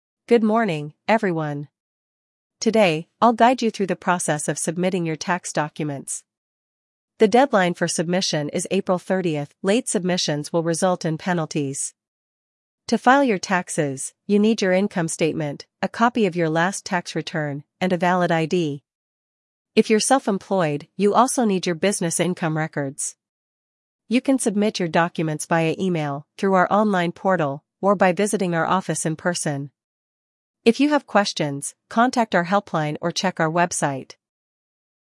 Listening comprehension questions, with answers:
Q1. What is the deadline for submitting tax documents?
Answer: April 30th

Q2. Which document is required for tax filing?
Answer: An income statement

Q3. How can people submit their tax documents?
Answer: Online or by email

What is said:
Employee: Good morning, everyone. Today, I'll guide you through the process of submitting your tax documents. The deadline for submission is April 30th. Late submissions will result in penalties.
To file your taxes, you need your income statement, a copy of your last tax return, and a valid ID. If you're self-employed, you also need your business income records.
You can submit your documents via email, through our online portal, or by visiting our office in person. If you have questions, contact our helpline or check our website.
Questions